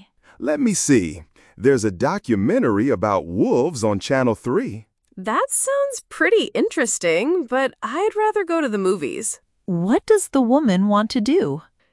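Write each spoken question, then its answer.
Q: What does the woman want to do?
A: Go to the movies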